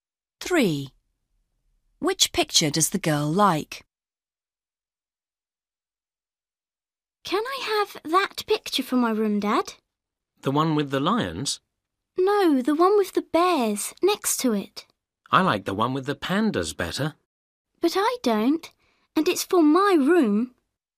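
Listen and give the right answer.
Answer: The one with the bears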